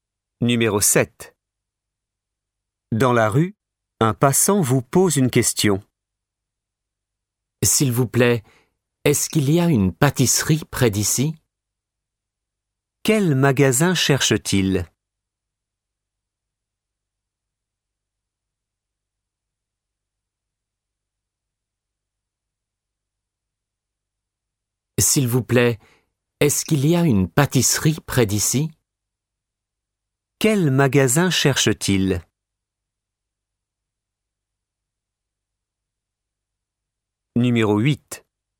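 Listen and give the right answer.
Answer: Une pâtisserie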